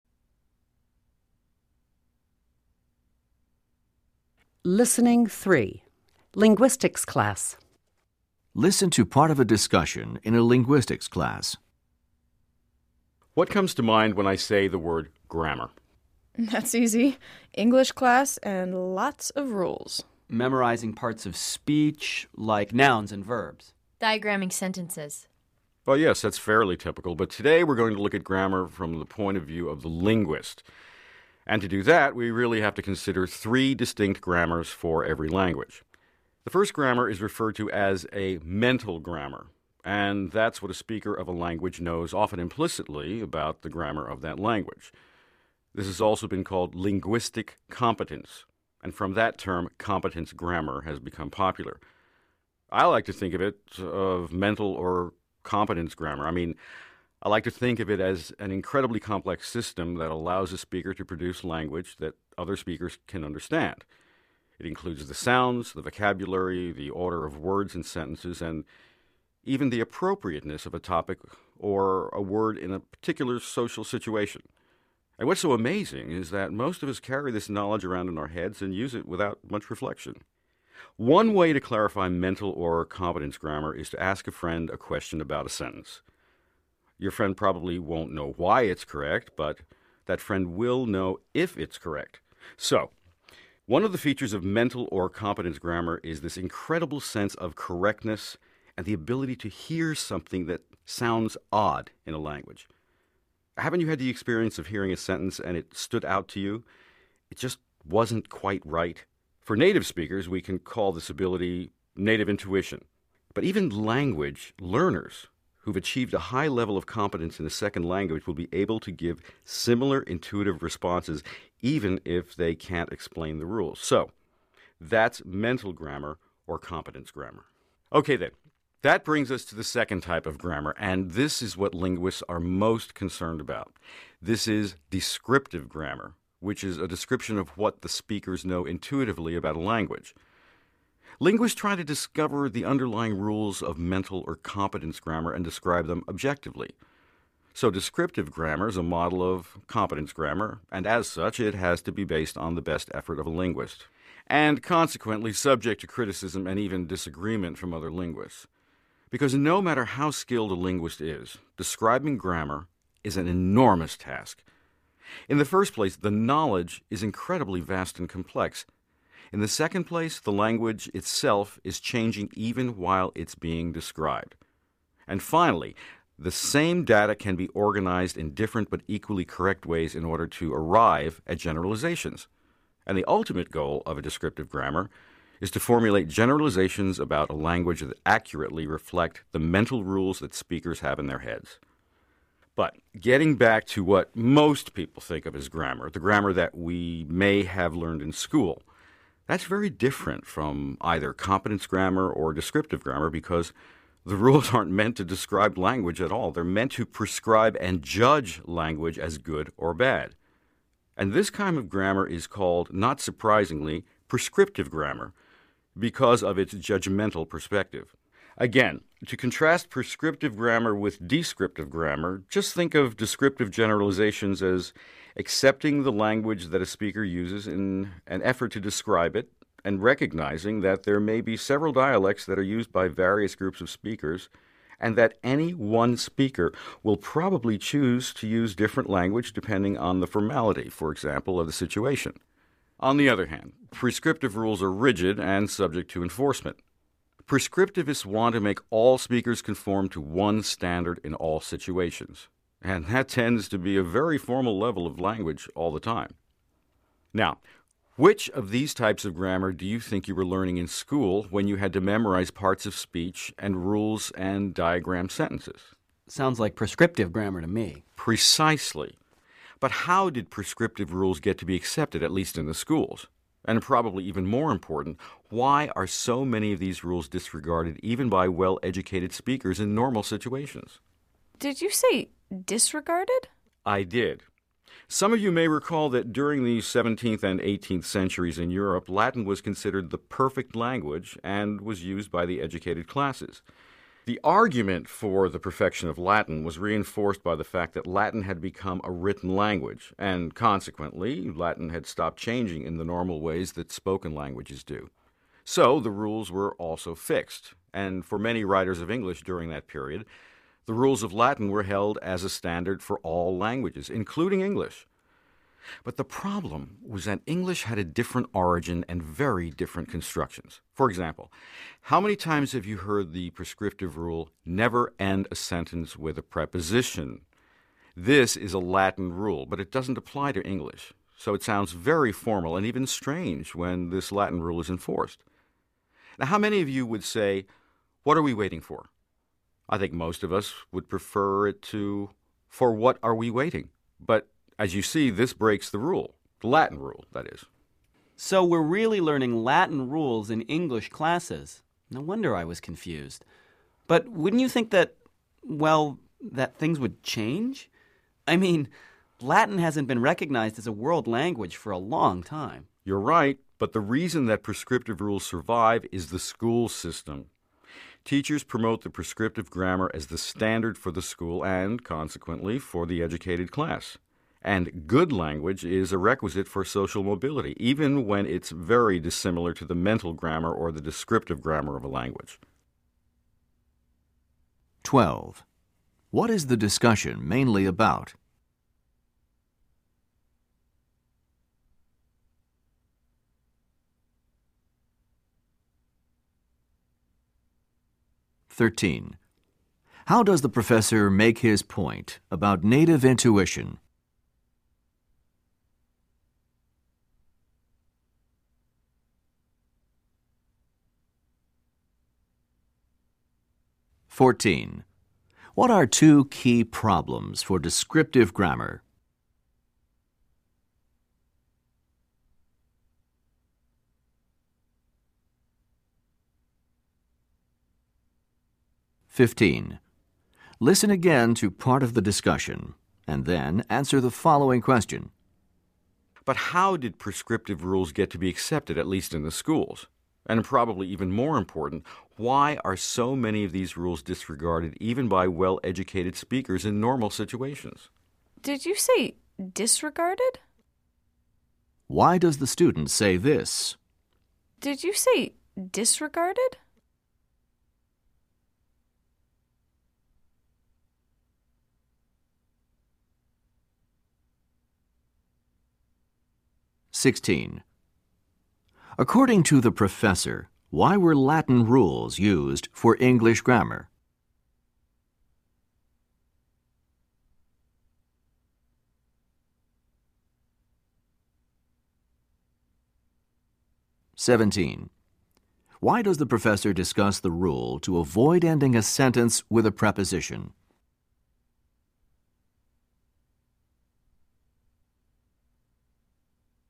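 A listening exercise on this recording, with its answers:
What is the discussion mainly about?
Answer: Different types of grammar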